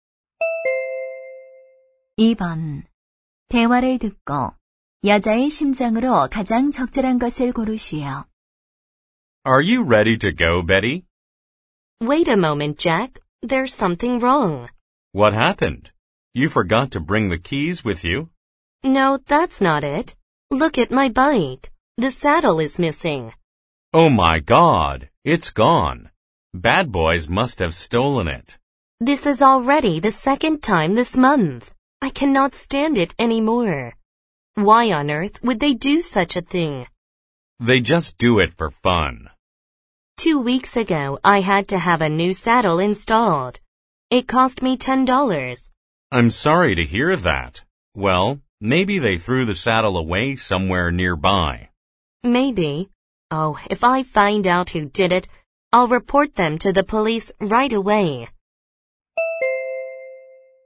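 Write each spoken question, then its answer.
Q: 대화를 듣고 여자의 심장으로 가장 적절한 것을 고르시오.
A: 화가 남 (자전거 안장을 또 도둑맞아서)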